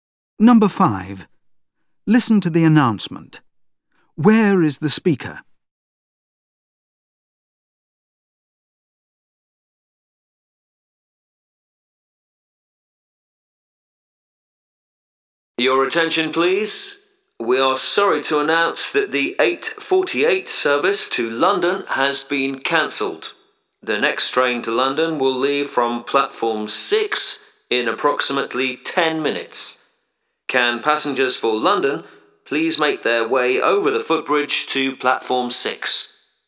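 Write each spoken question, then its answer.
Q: Where is the speaker?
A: At a train station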